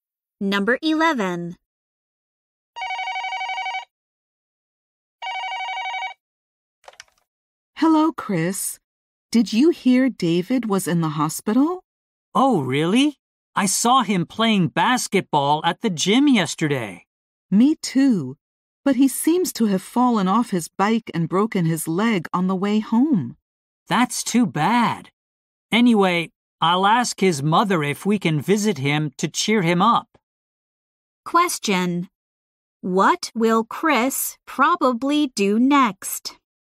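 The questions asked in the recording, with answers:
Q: What will Chris probably do next?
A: Ask David's mother if they can visit him.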